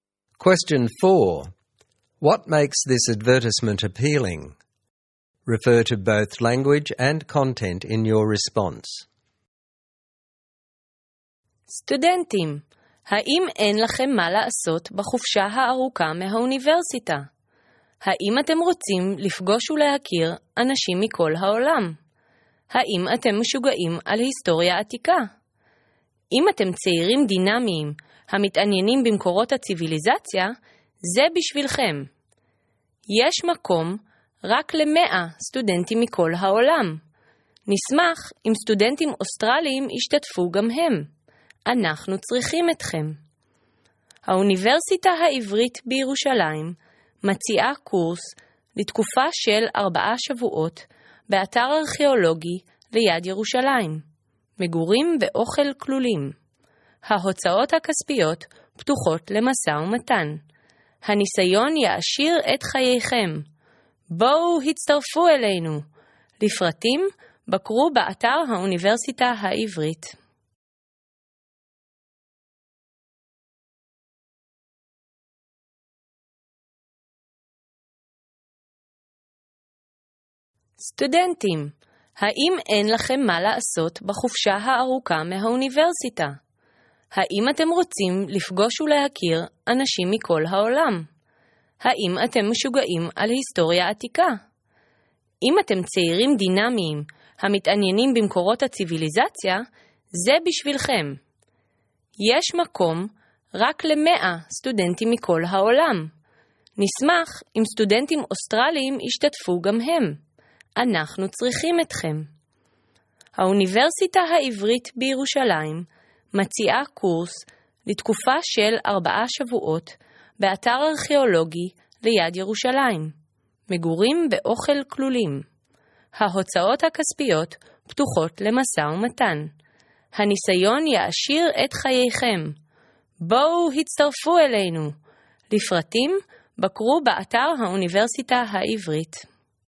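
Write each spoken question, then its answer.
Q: What makes this advertisement appealing?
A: It uses rhetorical questions aimed at students, flattering words like 'dynamic young people' and 'we need you', and direct calls such as 'come join us'. In content, it offers a 4-week archaeological course near Jerusalem with the Hebrew University, a chance to meet people from all over the world, only 100 places, Australians welcome, food and accommodation included, negotiable costs and an enriching experience.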